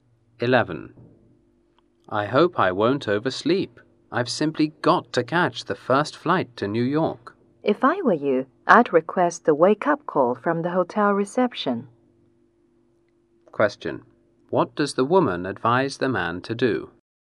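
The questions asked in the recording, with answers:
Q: What does the woman advise the man to do?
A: Ask the hotel reception for a wake-up call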